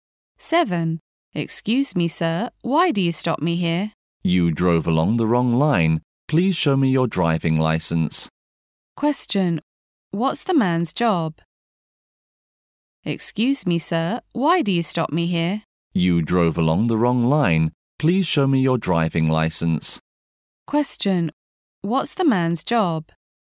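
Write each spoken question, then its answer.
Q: What's the man's job?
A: A policeman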